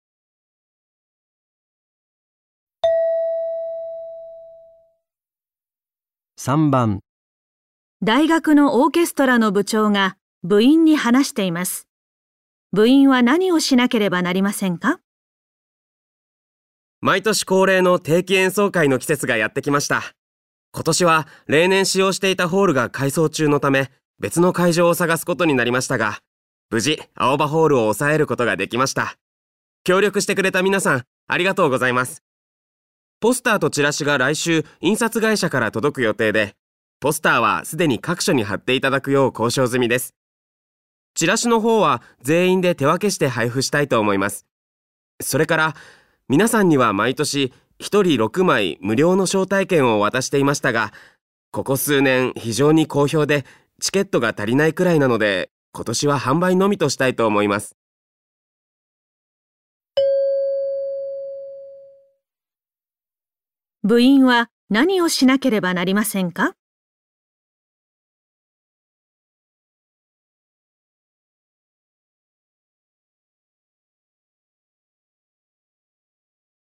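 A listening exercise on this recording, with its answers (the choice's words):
部員は何をしなければなりませんか?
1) 代わりの会場を探す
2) ポスターを張る場所を探す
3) ちらしを配る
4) 招待券を配る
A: ちらしを配る

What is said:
大学のオーケストラの長が部員に話しています。部員は何をしなければなりませんか?
毎年恒例の定期演奏会の季節がやってきました。今年は例年使用していたホールが改装中のため、別の会場を探すことになりましたが、無事、青葉ホールを押さえることができました。協力してくれた皆さん、ありがとうございます。ポスターとチラシが来週、印刷会社から届く予定で、ポスターはすでに各所に貼っていただくよう交渉済みです。チラシの方は全員で手分けして配布したいと思います。それから皆さんには毎年1人6枚無料の招待券を渡していましたが、ここ数年非常に好評でチケットが足りないくらいなので、今年は販売のみとしたいと思います。

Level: N1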